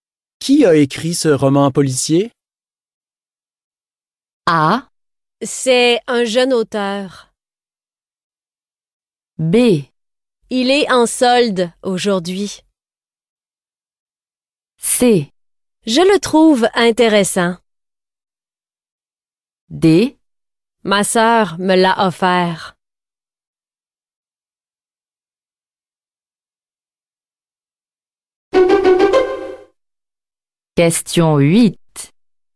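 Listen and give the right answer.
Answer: C'est un jeune auteur.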